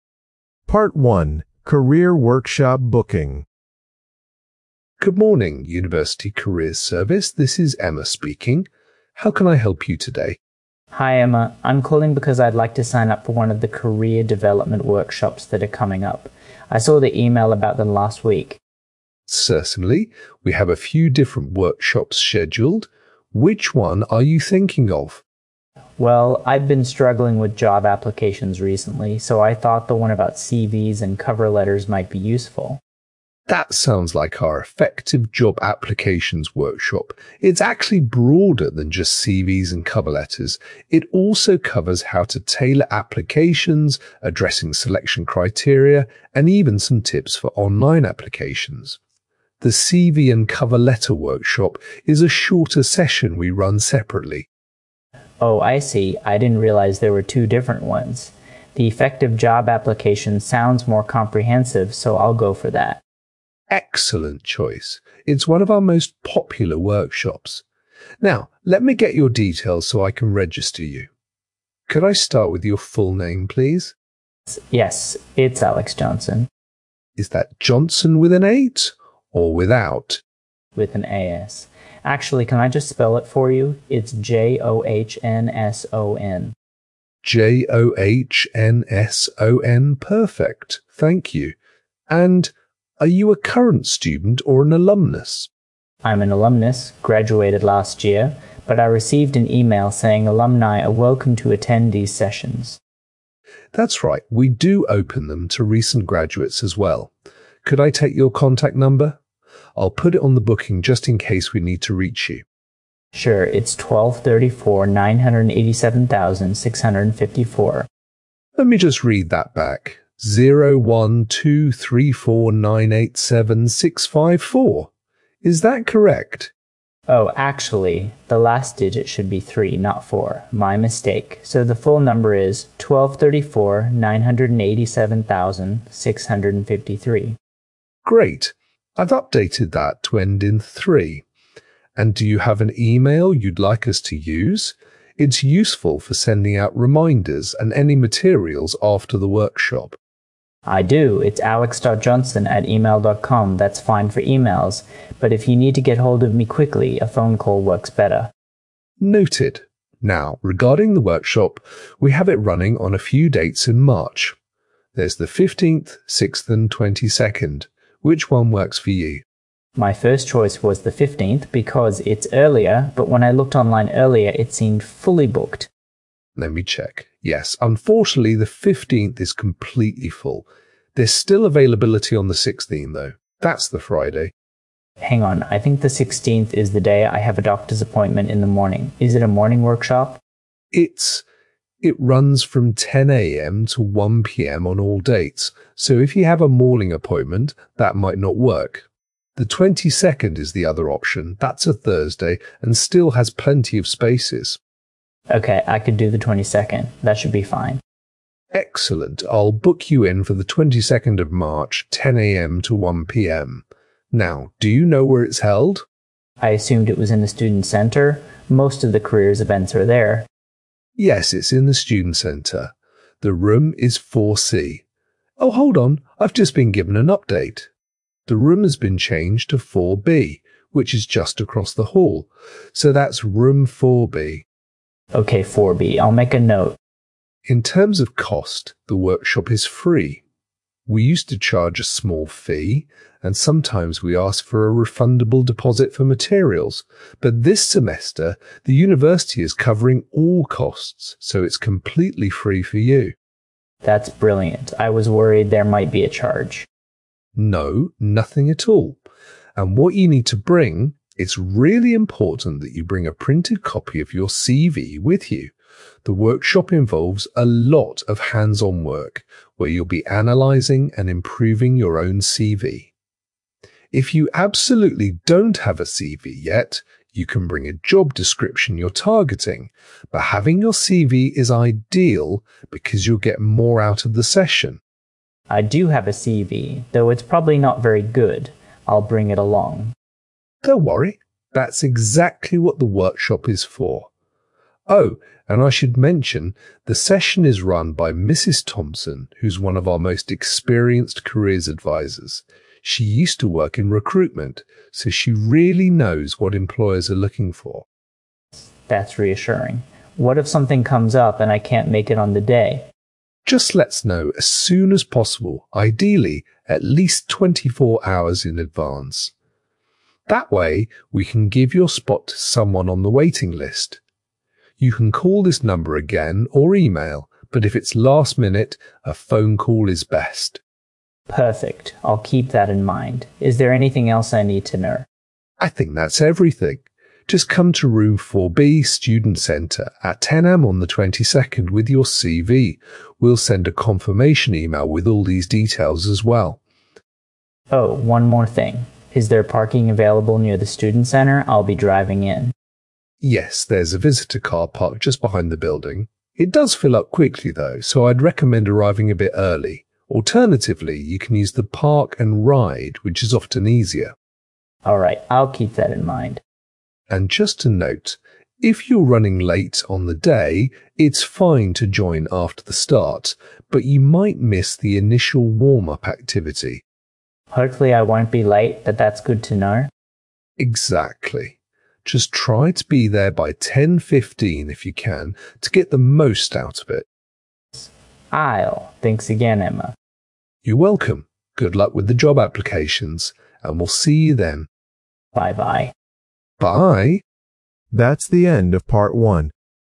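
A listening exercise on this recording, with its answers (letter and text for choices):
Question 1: Which workshop does the student decide to attend?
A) CV and Cover Letter Workshop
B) Effective Job Applications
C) Interview Techniques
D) Career Planning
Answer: B) Effective Job Applications

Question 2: How does the student spell his surname?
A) J-O-H-N-S-T-O-N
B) J-O-H-N-S-O-N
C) J-O-N-E-S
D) J-A-C-O-B-S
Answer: B) J-O-H-N-S-O-N

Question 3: What is the student's final mobile number?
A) 01234 987653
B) 01234 987654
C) 01234 987643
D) 01234 987664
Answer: A) 01234 987653

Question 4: On which date will the student attend the workshop?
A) 15th March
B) 16th March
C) 22nd March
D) 23rd March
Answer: C) 22nd March

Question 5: How much must the student pay for the workshop?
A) £10 deposit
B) £5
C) £20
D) Free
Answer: D) Free

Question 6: Where is the workshop room located?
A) Room 4C, Student Centre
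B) Room 4B, Student Centre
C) Room 4A, Library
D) Lecture Theatre 2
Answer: B) Room 4B, Student Centre

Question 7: What document should the student bring?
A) A printed CV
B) A completed application form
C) A job advertisement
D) A reference letter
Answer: A) A printed CV

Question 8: What time does the workshop start?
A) 9:00 am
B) 10:00 am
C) 2:00 pm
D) 3:30 pm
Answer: B) 10:00 am

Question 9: Who leads the workshop?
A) Dr. Patel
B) Mrs. Thompson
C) Mr. Lewis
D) A student volunteer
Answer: B) Mrs. Thompson

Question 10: What is the policy if the student cannot attend?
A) Email immediately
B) Cancel at least 24 hours in advance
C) Send a replacement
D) No notification needed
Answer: B) Cancel at least 24 hours in advance

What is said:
Part 1: Career Workshop Booking
Receptionist: Good morning, University Careers Service, this is Emma speaking. How can I help you today?
Student: Hi Emma, I'm calling because I'd like to sign up for one of the career development workshops that are coming up. 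I saw the email about them last week.
Receptionist: Certainly, we have a few different workshops scheduled. Which one are you thinking of?
Student: Well, I've been struggling with job applications recently, so I thought the one about CVs and cover letters might be useful.
Receptionist: That sounds like our Effective Job Applications workshop. It's actually broader than just CVs and cover letters - it also covers how to tailor applications, addressing selection criteria, and even some tips for online applications. The CV and Cover Letter Workshop is a shorter session we run separately.
Student: Oh, I see. I didn't realize there were two different ones. The Effective Job Applications sounds more comprehensive, so I'll go for that.
Receptionist: Excellent choice. It's one of our most popular workshops. Now, let me get your details so I can register you. Could I start with your full name, please?
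Student: Yes, it's Alex Johnson.
Receptionist: Is that Johnson with an 'h' or without?
Student: With an 'h'. Actually, can I just spell it for you? It's J-O-H-N-S-O-N.
Receptionist: J-O-H-N-S-O-N. Perfect, thank you. And are you a current student or an alumnus?
Student: I'm an alumnus, graduated last year. But I received an email saying alumni are welcome to attend these sessions.
Receptionist: That's right, we do open them to recent graduates as well. Could I take your contact number? I'll put it on the booking just in case we need to reach you.
Receptionist: Let me just read that back: 0-1-2-3-4, 9-8-7-6-5-4. Is that correct?
Student: Oh, actually, the last digit should be three, not four. My mistake. So the full number is 01234 987653.
Receptionist: Great, I've updated that to end in three. And do you have an email you'd like us to use? It's useful for sending out reminders and any materials after the workshop.
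Student: I do, it's alex.johnson@email.com. That's fine for emails, but if you need to get hold of me quickly, a phone call works better.
Receptionist: Noted. Now, regarding the workshop, we have it running on a few dates in March. There's the 15th, 16th, and 22nd. Which one works for you?
Student: My first choice was the 15th because it's earlier, but when I looked online earlier it seemed fully booked.
Receptionist: Let me check... Yes, unfortunately the 15th is completely full. There is still availability on the 16th, though. That's the Friday.
Student: Hang on, I think the 16th is the day I have a doctor's appointment in the morning. Is it a morning workshop?
Receptionist: It is, it runs from 10 am to 1 pm on all dates. So if you have a morning appointment, that might not work. The 22nd is the other option, that's a Thursday and still has plenty of spaces.
Student: Okay, I could do the 22nd. 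That should be fine.
Receptionist: Excellent, I'll book you in for the 22nd of March, 10 am to 1 pm. Now, do you know where it's held?
Student: I assumed it was in the Student Centre? Most of the careers events are there.
Receptionist: Yes, it is in the Student Centre. The room is 4C... oh, hold on, I've just been given an update. The room has been changed to 4B, which is just across the hall. So that's Room 4B.
Student: Okay, 4B. I'll make a note.
Receptionist: In terms of cost, the workshop is free. We used to charge a small fee, and sometimes we ask for a refundable deposit for materials, but this semester the university is covering all costs, so it's completely free for you.
Student: That's brilliant. I was worried there might be a charge.
Receptionist: No, nothing at all. And what you need to bring: it's really important that you bring a printed copy of your CV with you. The workshop involves a lot of hands-on work where you'll be analysing and improving your own CV. 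If you absolutely don't have a CV yet, you can bring a job description you're targeting, but having your CV is ideal because you'll get more out of the session.
Student: I do have a CV, though it's probably not very good. I'll bring it along.
Receptionist: Don't worry, that's exactly what the workshop is for! Oh, and I should mention, the session is run by Mrs. Thompson, who's one of our most experienced careers advisers. She used to work in recruitment, so she really knows what employers are looking for.
Student: That's reassuring. What if something comes up and I can't make it on the day?
Receptionist: Just let us know as soon as possible, ideally at least 24 hours in advance. That way we can give your spot to someone on the waiting list. You can call this number again or email, but if it's last-minute, a phone call is best.
Student: Perfect, I'll keep that in mind. Is there anything else I need to know?
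Receptionist: I think that's everything. Just come to Room 4B, Student Centre, at 10 am on the 22nd with your CV. We'll send a confirmation email with all these details as well.
Student: Oh, one more thing. Is there parking available near the Student Centre? I'll be driving in.
Receptionist: Yes, there's a visitor car park just behind the building. It does fill up quickly, though, so I'd recommend arriving a bit early. Alternatively, you can use the park-and-ride, which is often easier.
Receptionist: And just to note, if you're running late on the day, it's fine to join after the start, but you might miss the initial warm-up activity.
Student: Hopefully I won't be late, but that's good to know.
Receptionist: Exactly. Just try to be there by 10:15 if you can, to get the most out of it.
Student: I will. Thanks again, Emma.
Receptionist: You're welcome. Good luck with the job applications, and we'll see you then.
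Student: Bye bye.
Receptionist: Bye.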